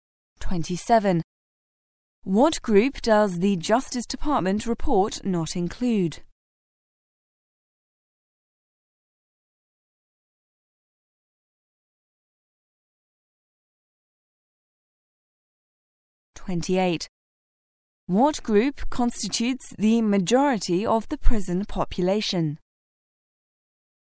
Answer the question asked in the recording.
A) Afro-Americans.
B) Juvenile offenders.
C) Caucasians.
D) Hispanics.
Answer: B) Juvenile offenders.

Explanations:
此题考查听细节的能力。解题关键是听到对应原文"Sometimes it's polite in Asia to make noise"。